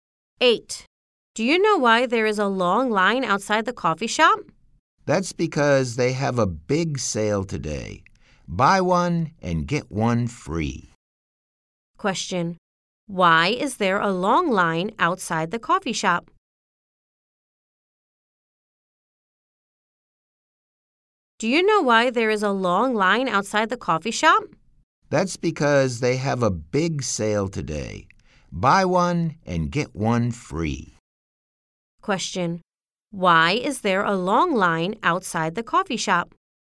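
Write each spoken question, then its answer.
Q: Why is there a long line outside the coffee shop?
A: They have a big sale today: buy one, get one free.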